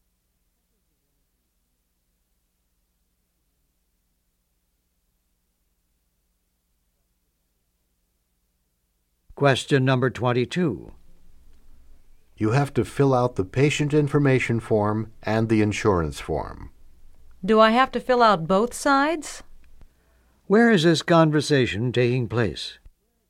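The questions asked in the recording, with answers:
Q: Where is this conversation taking place?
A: At a doctor's office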